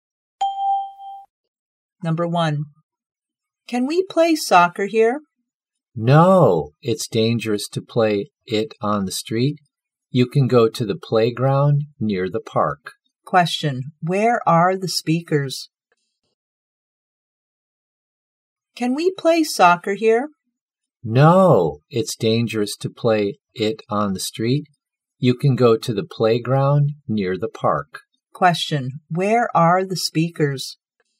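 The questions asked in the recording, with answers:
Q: Question, where are the speakers?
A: On the street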